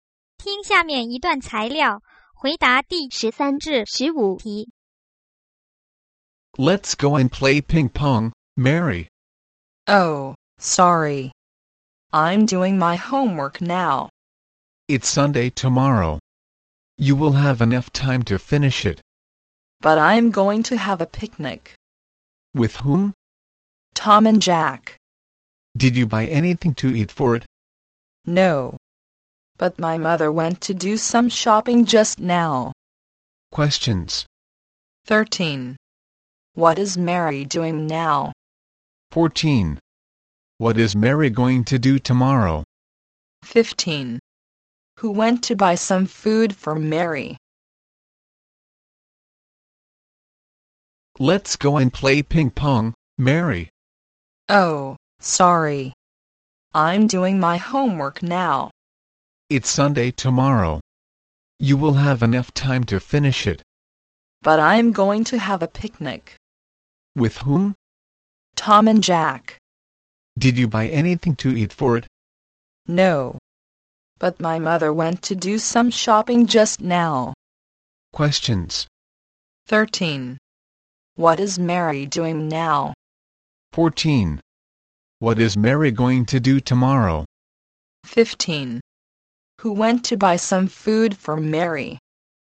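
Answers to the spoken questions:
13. Doing her homework
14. Have a picnic
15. Her mother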